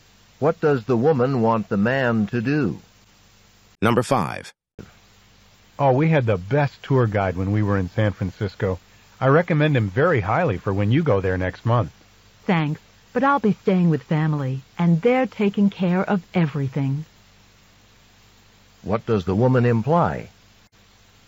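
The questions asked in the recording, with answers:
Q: What does the woman imply?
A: She won't need a tour guide because her family is taking care of everything.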